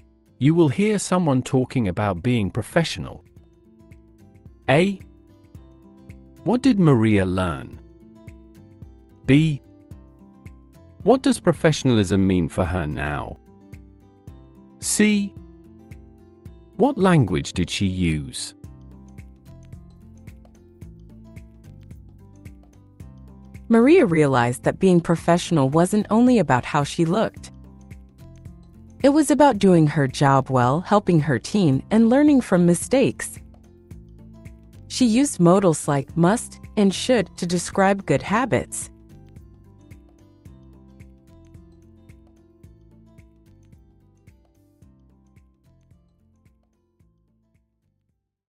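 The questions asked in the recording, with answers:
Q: What did Maria learn?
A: That being professional wasn't only about how she looked

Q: What does professionalism mean for her now?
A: Doing her job well, helping her team, and learning from mistakes

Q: What language did she use?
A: Modals like must and should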